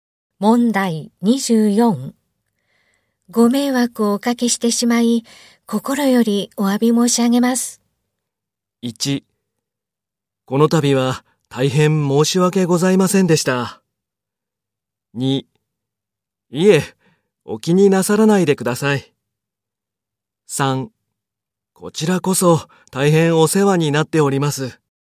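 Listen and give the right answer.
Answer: 2: いえ、お気になさらないでください。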